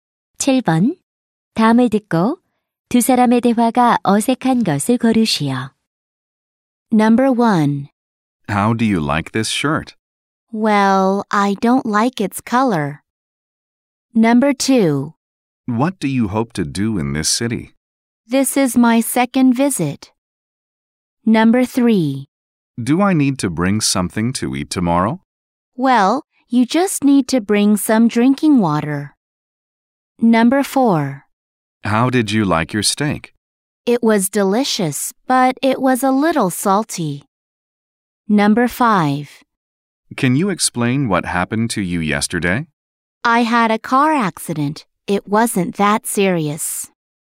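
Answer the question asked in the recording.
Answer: 2: What do you hope to do in this city? / This is my second visit.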